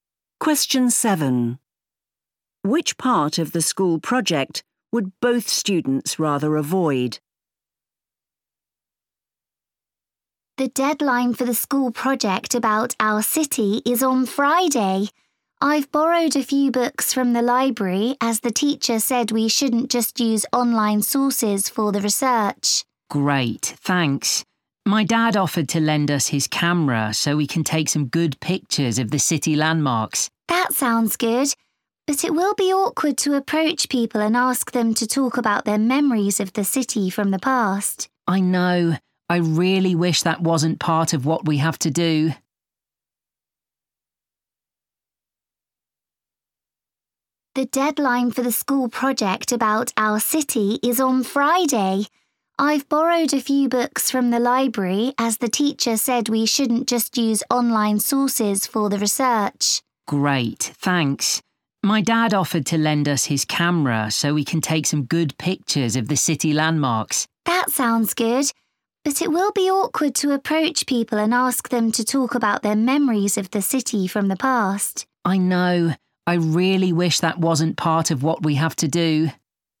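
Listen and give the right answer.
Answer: Asking people about their memories of the city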